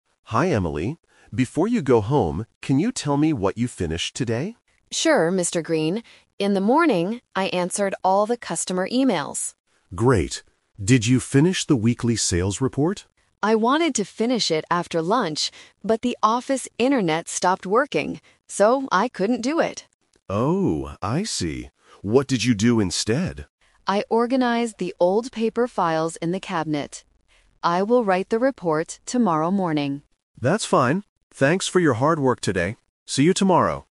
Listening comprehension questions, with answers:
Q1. What did Emily do in the morning?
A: She answered customer emails.

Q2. Why didn't Emily finish the report?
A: Because the office internet stopped working.

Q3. What did Emily do in the afternoon instead?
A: She organized the paper files.

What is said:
Mr. Green: Hi Emily. Before you go home, can you tell me what you finished today?
Emily: Sure, Mr. Green. In the morning, I answered all the customer emails.
Mr. Green: Great. Did you finish the weekly sales report?
Emily: I wanted to finish it after lunch, but the office internet stopped working. So, I couldn't do it.
Mr. Green: Oh, I see. What did you do instead?
Emily: I organized the old paper files in the cabinet. I will write the report tomorrow morning.